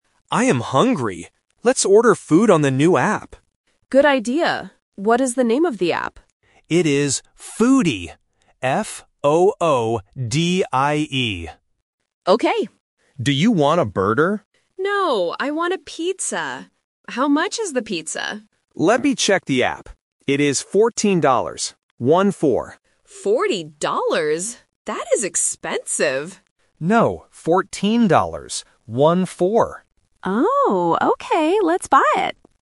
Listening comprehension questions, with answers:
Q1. How does Tom spell the name of the app?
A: F-O-O-D-I-E

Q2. What does Emma want to eat?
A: A pizza

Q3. How much is the pizza?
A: $14